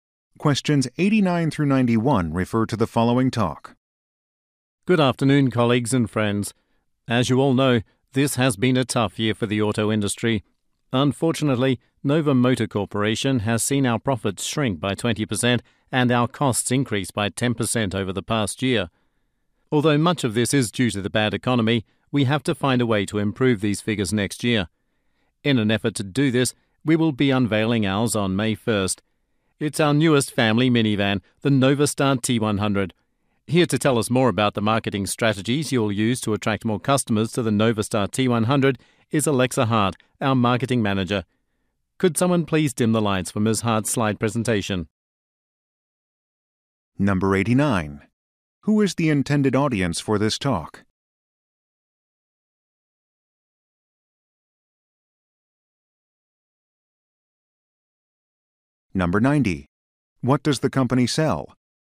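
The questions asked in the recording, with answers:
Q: Who is the intended audience for this talk?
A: Employees of Nova Motor Corporation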